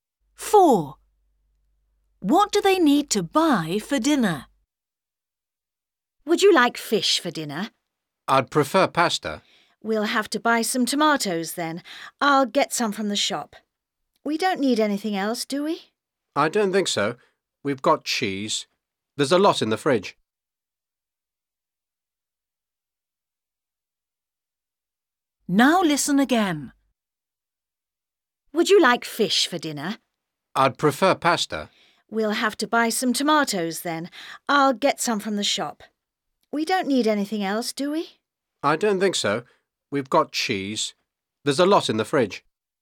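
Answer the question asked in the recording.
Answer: tomatoes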